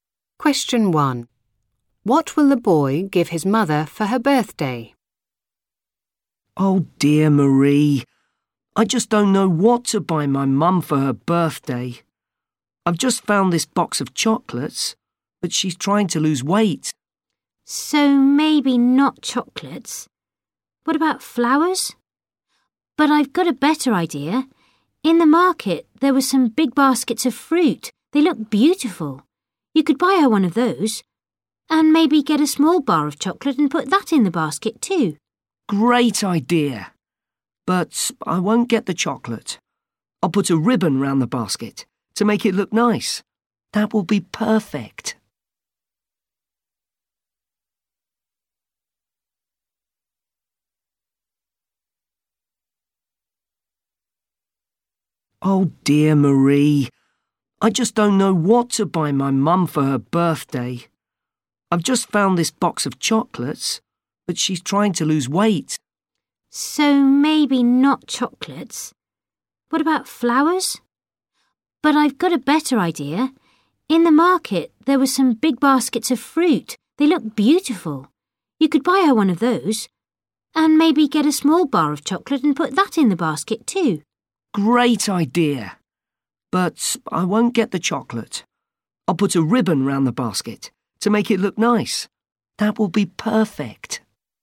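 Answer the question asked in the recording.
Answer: A basket of fruit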